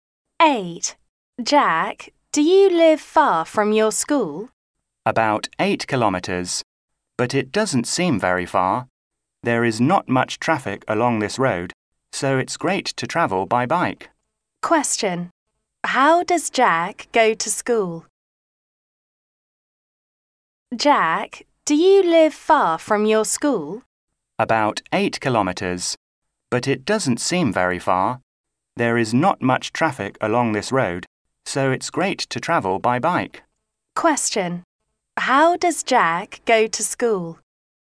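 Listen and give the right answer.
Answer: By bike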